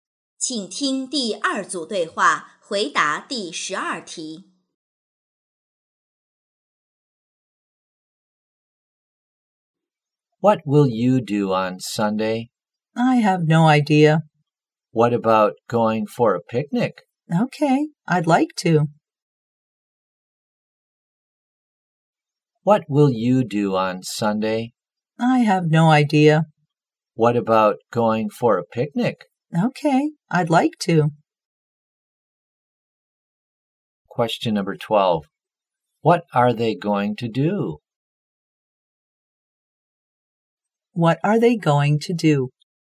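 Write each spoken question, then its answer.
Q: What are they going to do?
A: Go for a picnic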